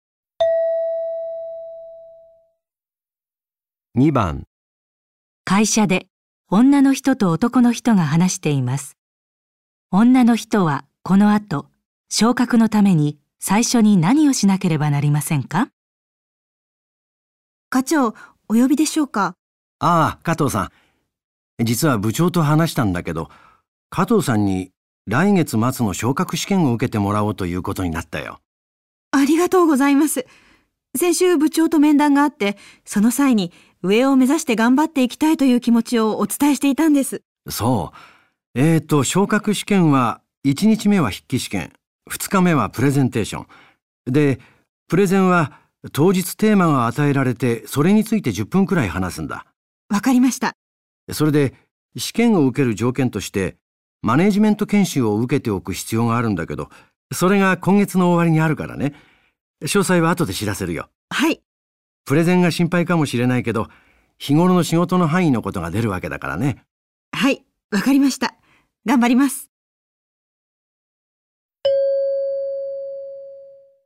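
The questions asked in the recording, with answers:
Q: 女の人はこの後、昇格のために最初に何をしなければなりませんか?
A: マネジメント研修を受ける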